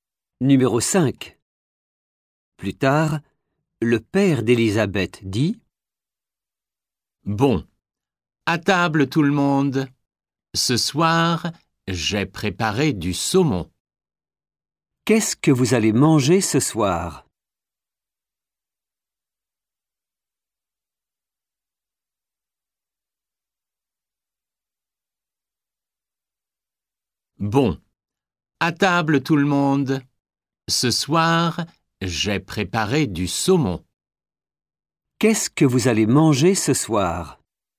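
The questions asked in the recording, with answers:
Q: Qu'est-ce que vous allez manger ce soir ?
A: Du saumon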